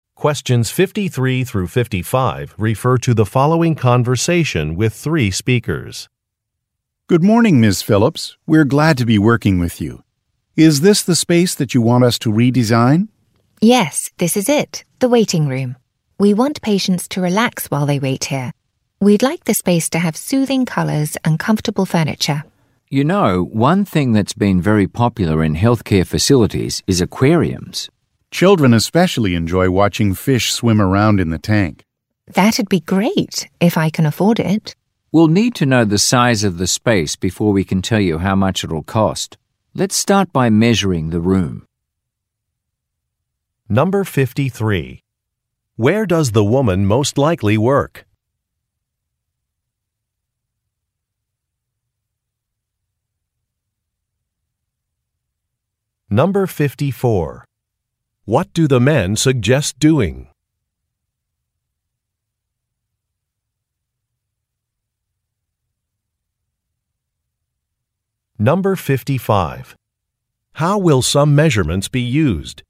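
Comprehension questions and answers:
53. Where does the woman most likely work?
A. At an elementary school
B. At a pet store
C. At a medical clinic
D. At a department store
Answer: C. At a medical clinic

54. What do the men suggest doing?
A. Upgrading a sound system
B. Installing a fish tank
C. Changing a color scheme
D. Replacing some flooring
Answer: B. Installing a fish tank

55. How will some measurements be used?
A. To draft a cost estimate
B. To purchase some bookshelves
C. To decide what materials to use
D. To apply for a building permit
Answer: A. To draft a cost estimate

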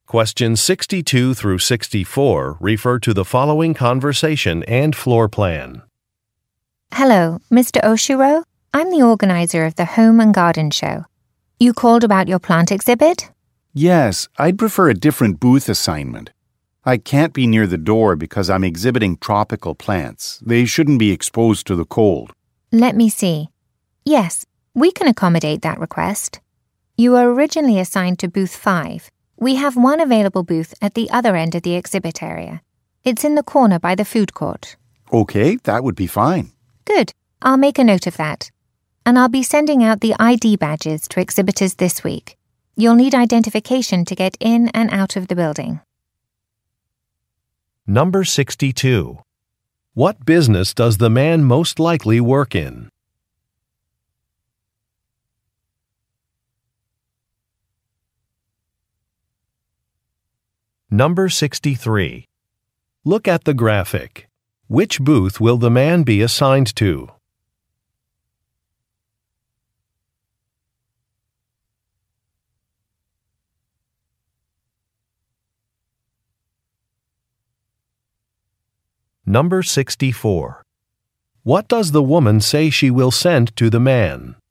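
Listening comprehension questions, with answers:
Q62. What business does the man most likely work in?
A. Electronics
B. Clothing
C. Gardening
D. Cookware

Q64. What does the woman say she will send to the man?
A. Admission tickets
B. An identification badge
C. A registration receipt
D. A parking permit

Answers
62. C. Gardening
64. B. An identification badge

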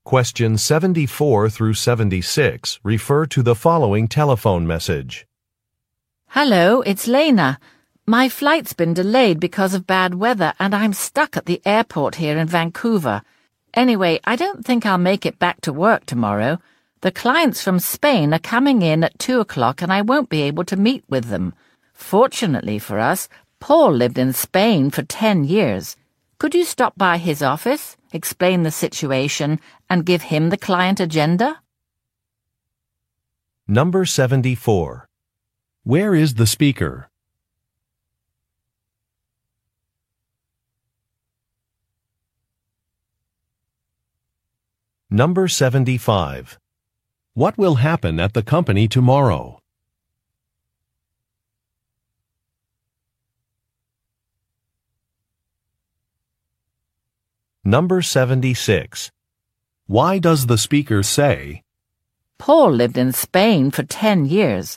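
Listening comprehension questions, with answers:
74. Where is the speaker?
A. At a hotel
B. At a travel agency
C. On a train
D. In an airport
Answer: D. In an airport

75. What will happen at the company tomorrow?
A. New furniture will arrive.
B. Some clients will visit.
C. A new employee will be introduced.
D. Some computer software will be updated.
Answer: B. Some clients will visit.

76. Why does the speaker say, "Paul lived in Spain for ten years"?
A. To recommend a colleague for a task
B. To suggest a travel destination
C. To express surprise about an anniversary date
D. To correct a data-entry error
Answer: A. To recommend a colleague for a task

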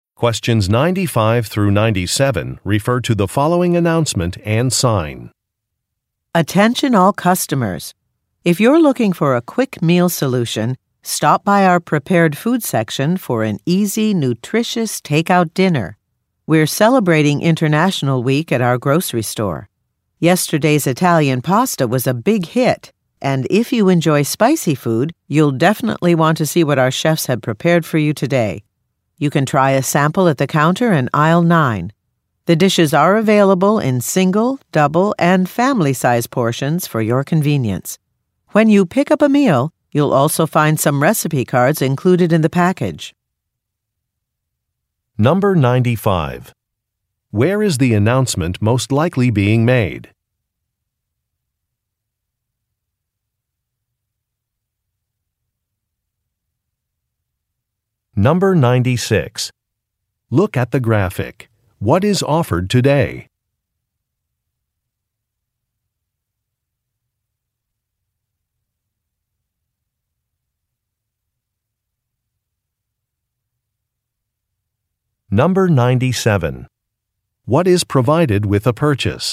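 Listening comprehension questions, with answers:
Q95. Where is the announcement most likely being made?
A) In an amusement park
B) In a supermarket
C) In a restaurant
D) In an airport lounge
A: B) In a supermarket

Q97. What is provided with a purchase?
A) Beverages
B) Serving utensils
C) Discount coupons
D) Recipes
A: D) Recipes

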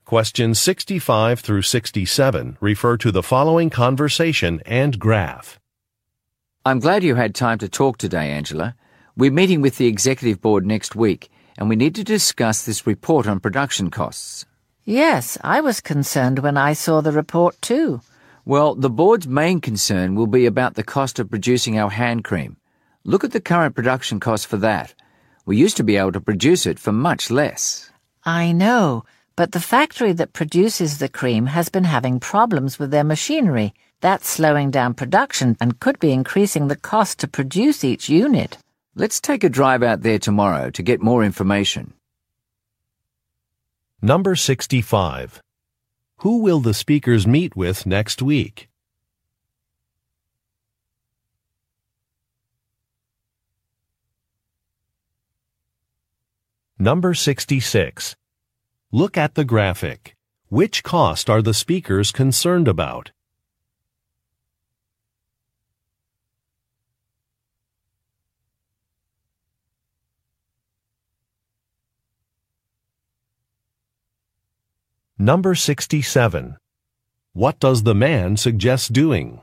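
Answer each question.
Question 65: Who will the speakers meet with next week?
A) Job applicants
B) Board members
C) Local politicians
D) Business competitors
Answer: B) Board members

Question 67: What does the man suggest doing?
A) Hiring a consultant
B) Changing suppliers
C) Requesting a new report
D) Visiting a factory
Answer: D) Visiting a factory

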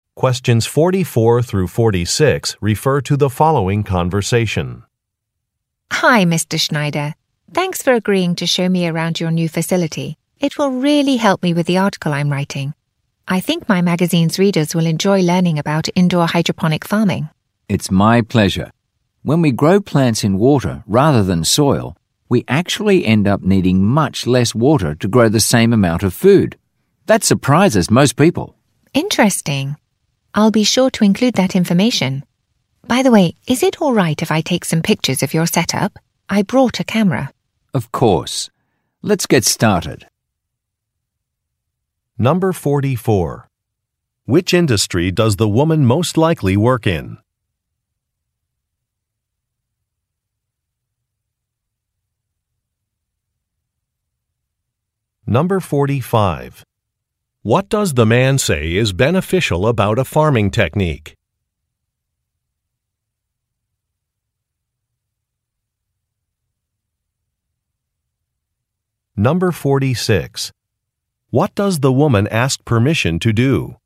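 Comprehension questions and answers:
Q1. Which industry does the woman most likely work in?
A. Journalism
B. Marketing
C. Entertainment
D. Technology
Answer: A. Journalism

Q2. What does the man say is beneficial about a farming technique?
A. It is easy to learn.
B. It improves air quality.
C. It reduces food waste.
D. It requires less water.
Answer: D. It requires less water.

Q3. What does the woman ask permission to do?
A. Review some financial documents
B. Taste some food samples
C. Take some photographs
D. Return on another day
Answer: C. Take some photographs

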